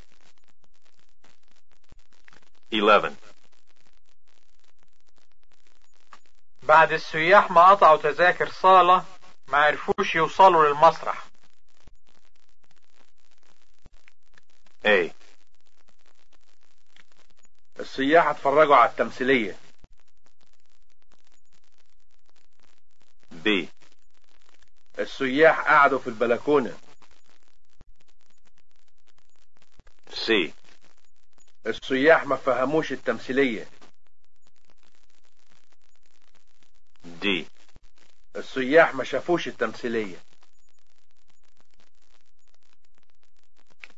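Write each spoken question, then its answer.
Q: بعد السياح ما قطعوا تذاكر صالة ما عرفوش يوصلوا للمسرح.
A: D: السياح ما شافوش التمثيلية.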